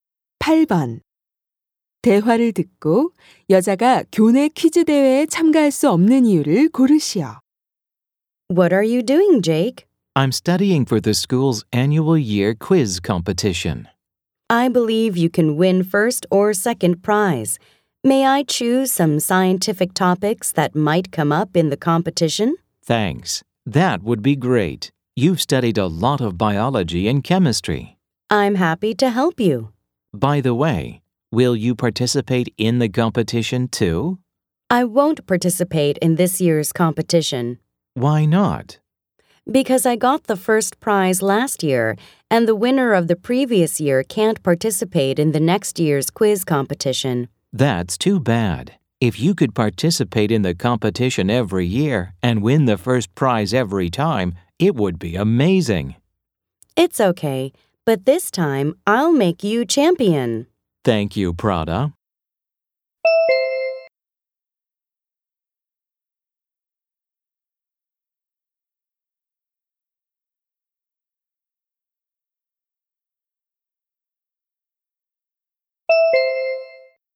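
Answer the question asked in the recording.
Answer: 작년에 1등을 해서 전년도 우승자는 참가할 수 없기 때문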